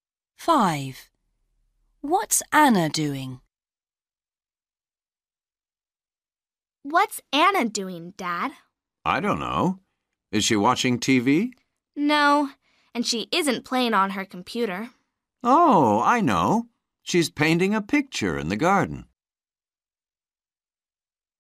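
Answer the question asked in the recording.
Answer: Painting a picture in the garden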